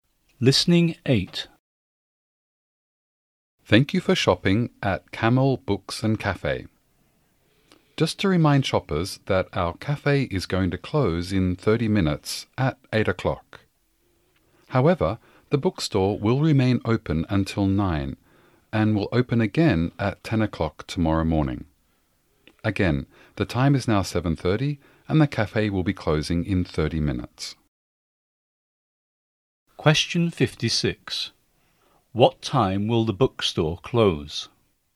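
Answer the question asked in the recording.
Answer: 9 o'clock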